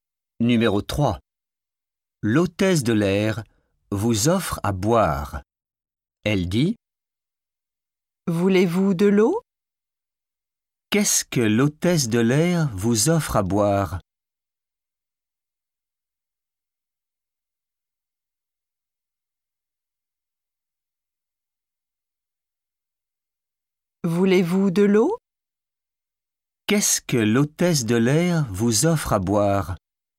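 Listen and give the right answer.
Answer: De l'eau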